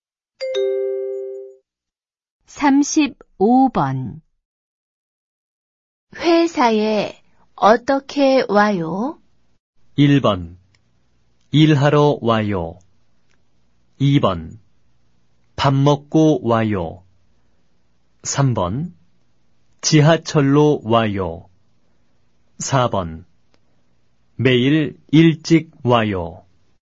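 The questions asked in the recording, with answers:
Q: 회사에 어떻게 와요?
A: 3: 지하철로 와요.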